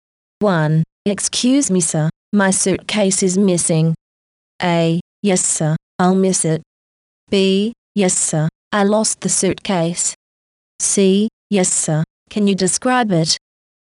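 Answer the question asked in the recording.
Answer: C: Yes, sir, can you describe it?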